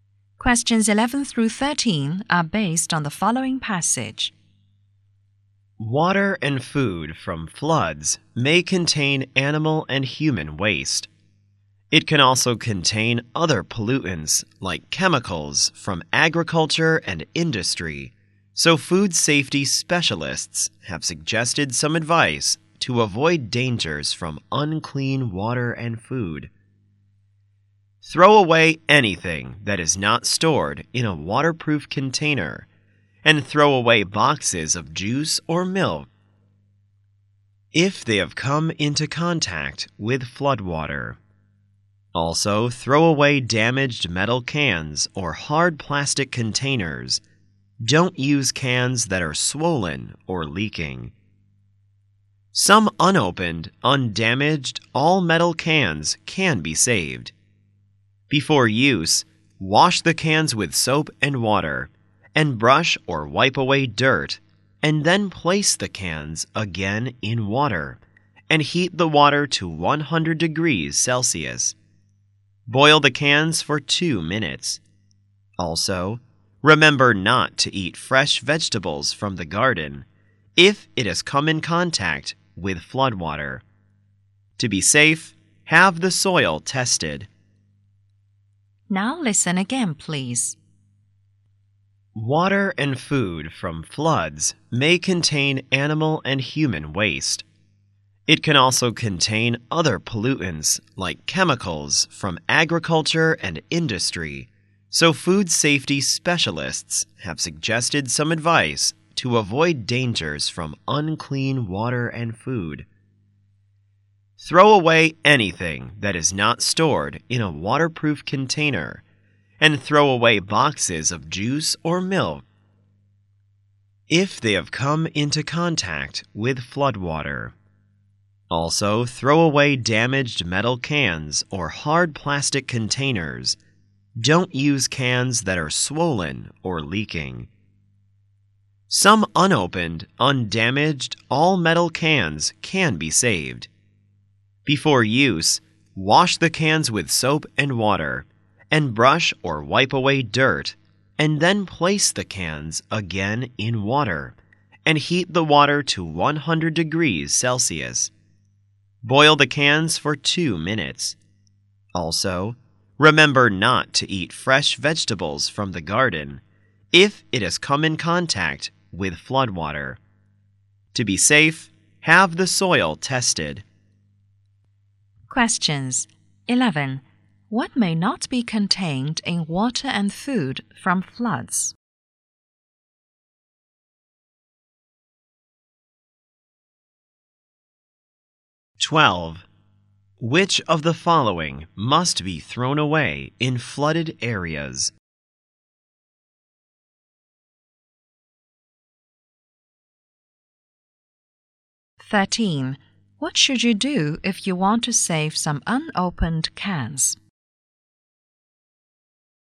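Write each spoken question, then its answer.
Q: What should you do if you want to save some unopened cans?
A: Wash them with soap and water, then boil them for 2 minutes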